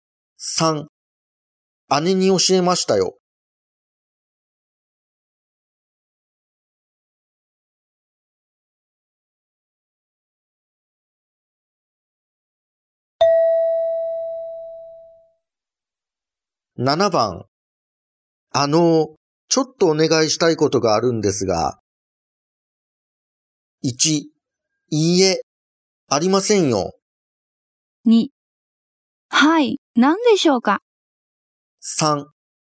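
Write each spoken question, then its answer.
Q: ちょっとお願いしたいことがあるんですが。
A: 2: はい、何でしょうか。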